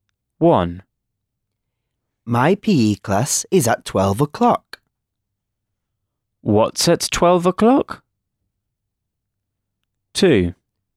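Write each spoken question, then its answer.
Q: What's at 12 o'clock?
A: PE class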